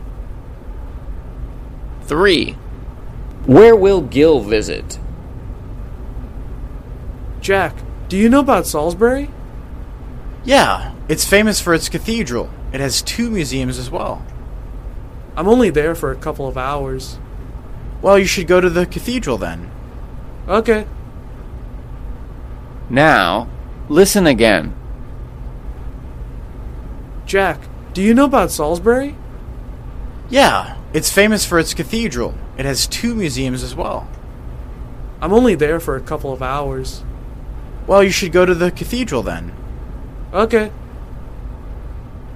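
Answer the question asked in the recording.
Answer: The cathedral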